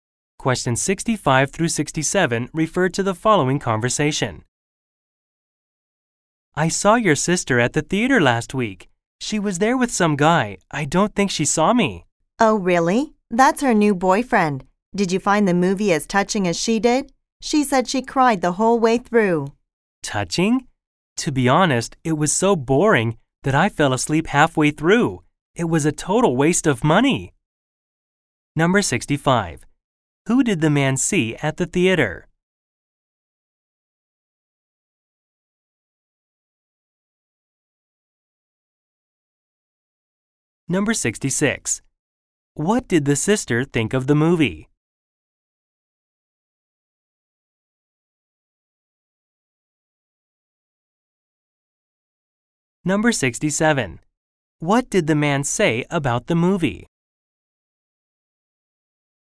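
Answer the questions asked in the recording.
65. The woman's sister (with her new boyfriend)
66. It was touching
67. It was boring and a waste of money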